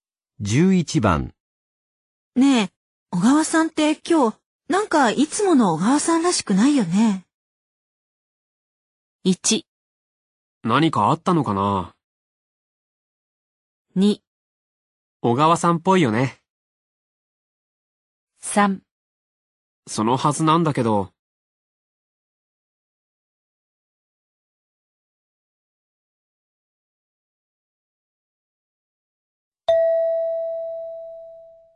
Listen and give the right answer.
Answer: 1

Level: N2 Listening · Test 12